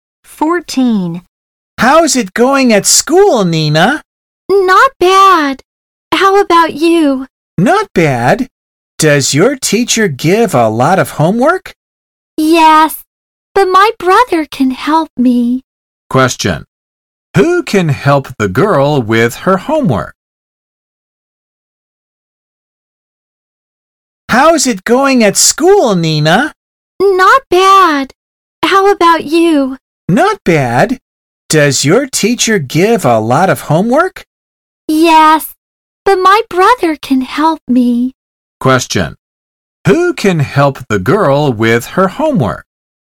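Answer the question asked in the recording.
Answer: Her brother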